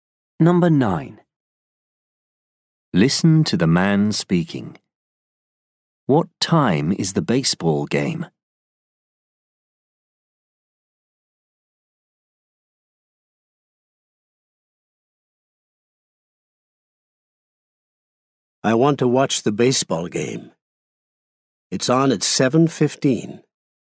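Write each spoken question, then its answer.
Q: What time is the baseball game?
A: 7:15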